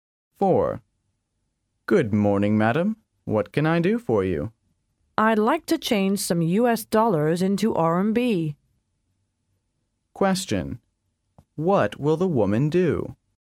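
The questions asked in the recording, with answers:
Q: What will the woman do?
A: Change some US dollars into RMB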